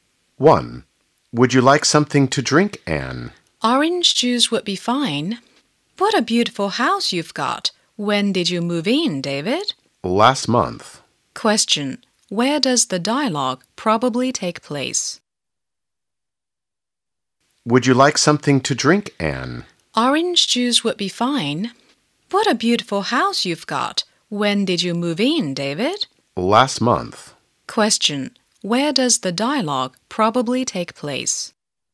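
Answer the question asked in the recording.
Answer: At David's house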